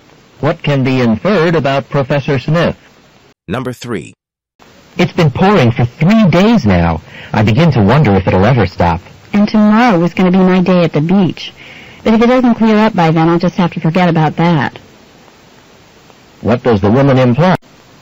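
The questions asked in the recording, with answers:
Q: What does the woman imply?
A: She will cancel her beach trip if the rain doesn't stop.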